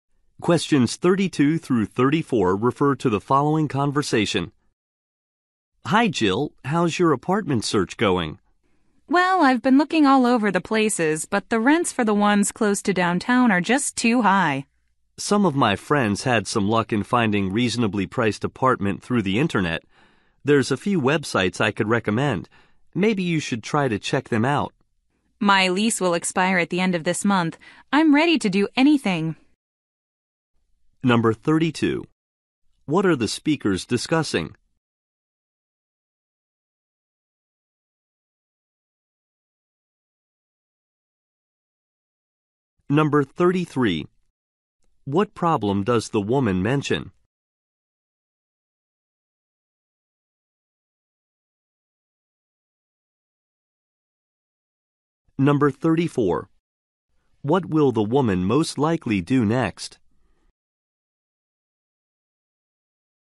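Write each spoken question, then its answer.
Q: What are the speakers discussing?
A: The woman's apartment search

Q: What problem does the woman mention?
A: Rents near downtown are too high

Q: What will the woman most likely do next?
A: Check apartment websites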